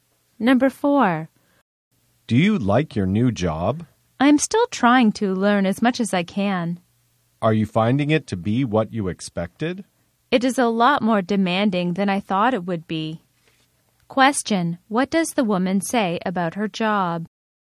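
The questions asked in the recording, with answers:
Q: What does the woman say about her job?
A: It is more demanding than she expected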